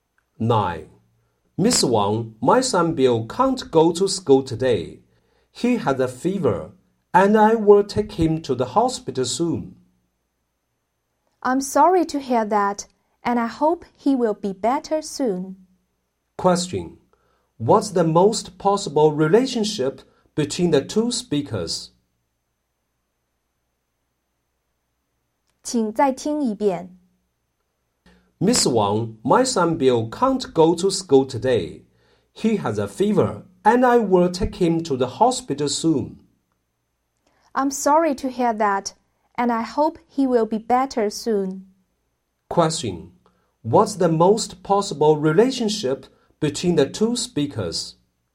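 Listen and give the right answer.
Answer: Teacher and parent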